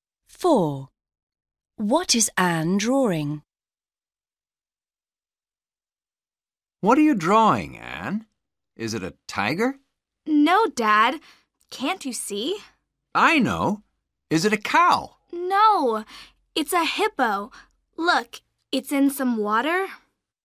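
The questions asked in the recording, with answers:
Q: What is Anne drawing?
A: A hippo in some water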